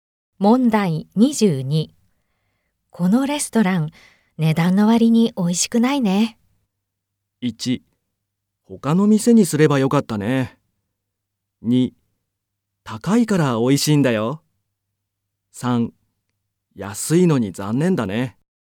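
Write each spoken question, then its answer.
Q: このレストラン、値段の割に美味しくないね。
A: 1: 他の店にすればよかったね。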